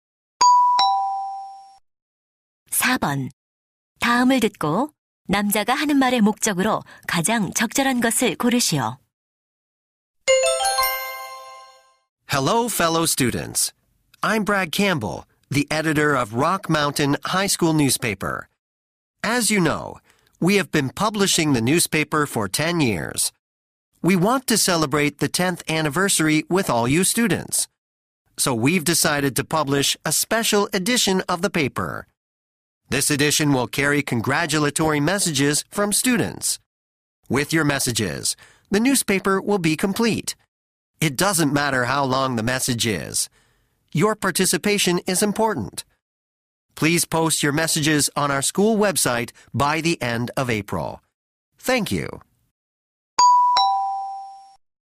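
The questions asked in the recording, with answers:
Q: 다음을 듣고 남자가 하는 말의 목적으로 가장 적절한 것을 고르시오.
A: 학교 신문 10주년 특별판에 실을 축하 메시지를 요청하려고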